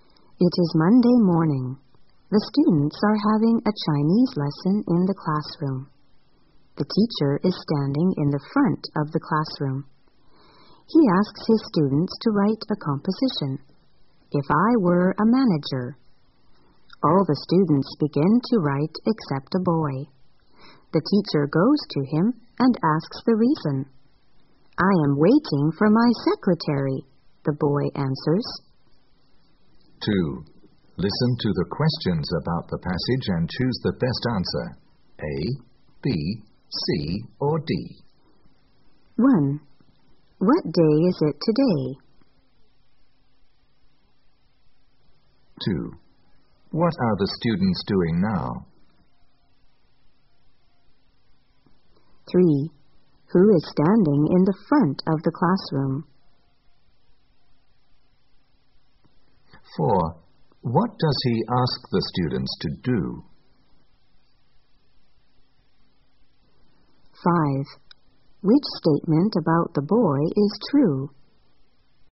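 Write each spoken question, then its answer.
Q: What day is it today?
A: Monday

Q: What are the students doing now?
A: Having a Chinese lesson

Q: Who is standing in the front of the classroom?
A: The teacher

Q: What does he ask the students to do?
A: Write a composition, "If I were a manager"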